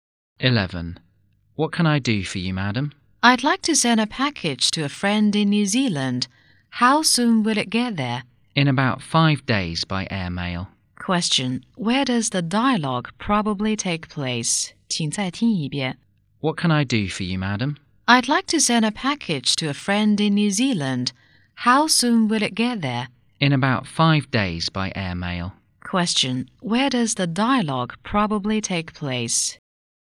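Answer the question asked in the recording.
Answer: At a post office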